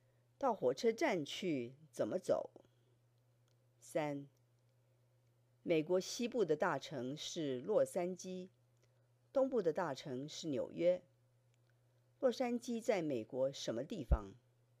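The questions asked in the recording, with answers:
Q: 洛杉矶在美国什么地方?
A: 西部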